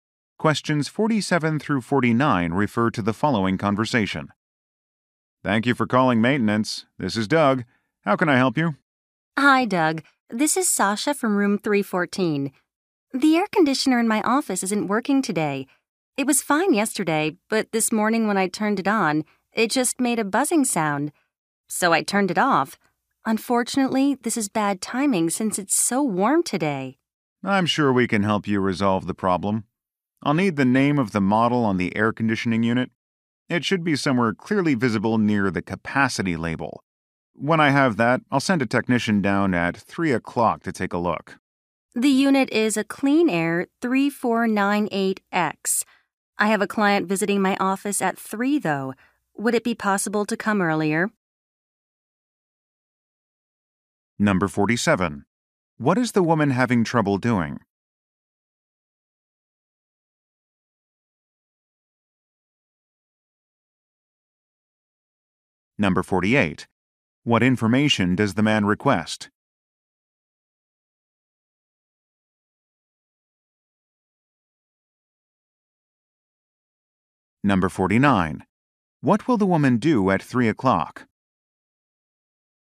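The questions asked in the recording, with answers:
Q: What is the woman having trouble doing?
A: Using the air conditioner in her office

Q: What information does the man request?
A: The model name of the air conditioner

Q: What will the woman do at 3 o'clock?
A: Meet a client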